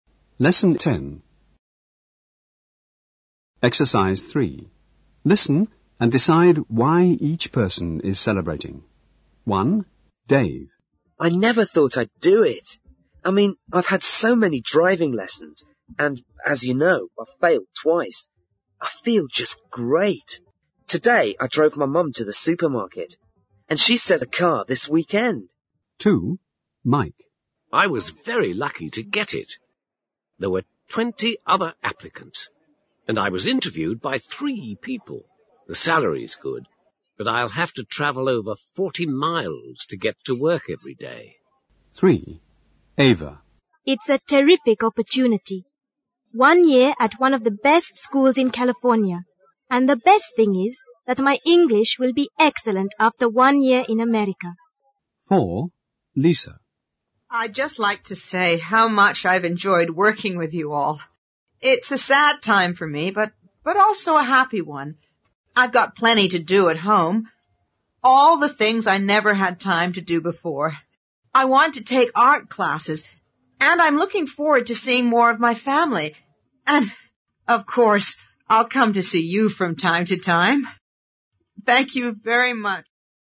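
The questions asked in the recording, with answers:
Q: Listen and decide why each person is celebrating.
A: Dave passed his driving test

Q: Listen and decide why each person is celebrating.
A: Mike got a new job

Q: Listen and decide why each person is celebrating.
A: Ava won a place to study for a year at a school in California

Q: Listen and decide why each person is celebrating.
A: Lisa is retiring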